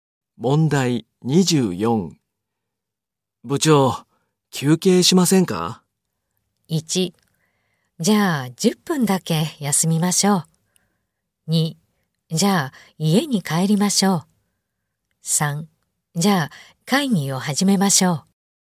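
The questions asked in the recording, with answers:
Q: 部長、休憩しませんか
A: 1: じゃあ10分だけ休みましょう。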